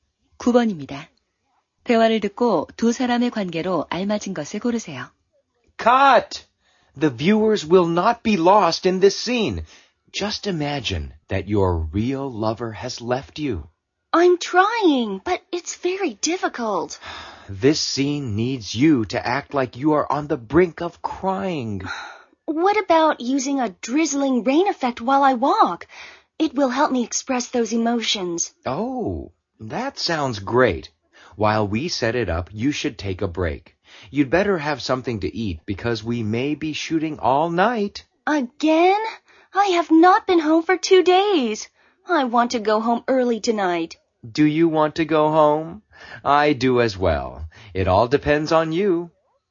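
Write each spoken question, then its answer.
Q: 대화를 듣고 두 사람의 관계로 알맞은 것을 고르세요.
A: 영화감독과 배우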